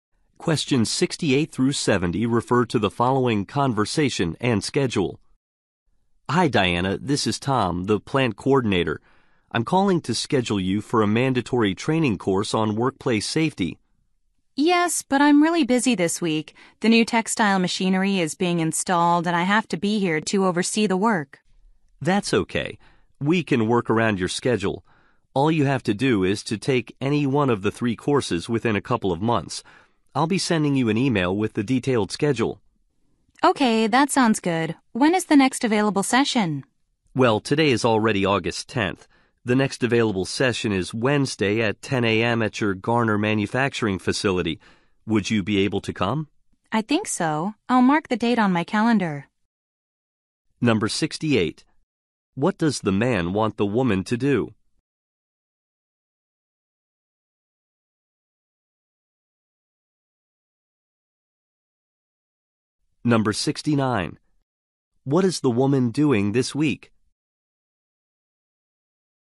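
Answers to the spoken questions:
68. Take a workplace safety training course
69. Overseeing installation of new textile machinery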